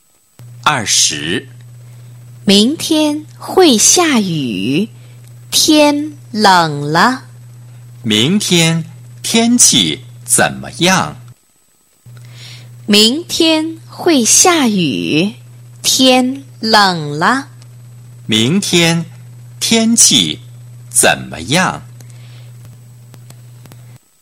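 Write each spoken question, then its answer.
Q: 明天天气怎么样?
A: 会下雨,天冷了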